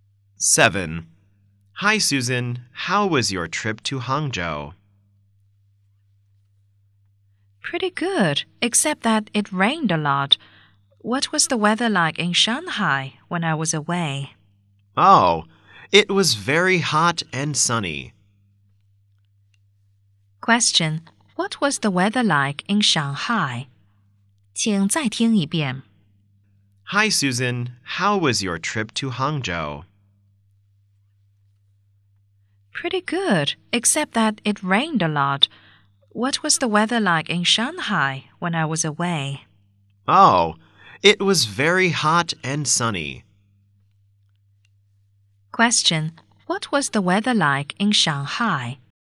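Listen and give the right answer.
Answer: Very hot and sunny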